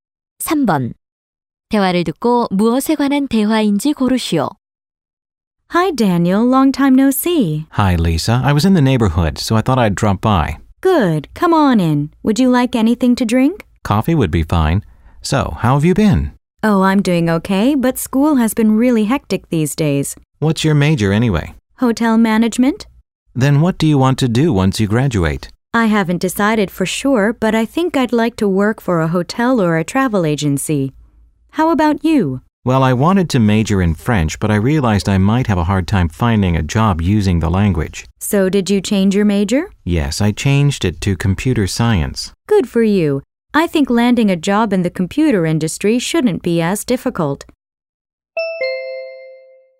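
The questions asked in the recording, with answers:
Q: 대화를 듣고 무엇에 관한 대화인지 고르시오.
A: 전공과 졸업 후 진로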